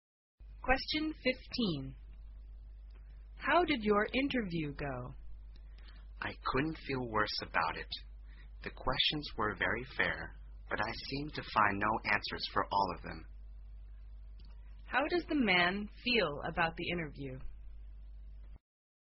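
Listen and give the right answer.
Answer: He feels very bad about it; he couldn't answer the questions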